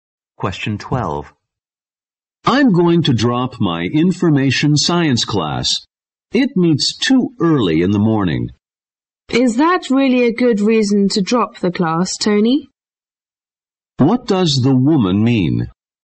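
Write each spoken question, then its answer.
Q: What does the woman mean?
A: That starting too early is not a good reason to drop the class.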